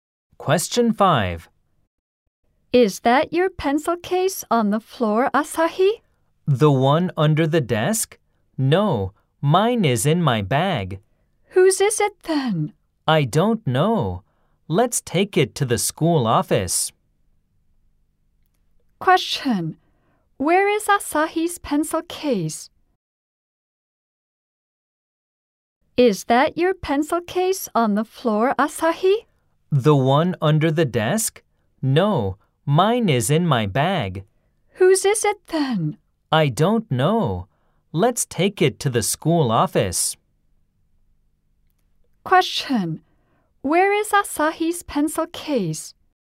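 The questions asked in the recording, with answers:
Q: Where is Asahi's pencil case?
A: In Asahi's bag.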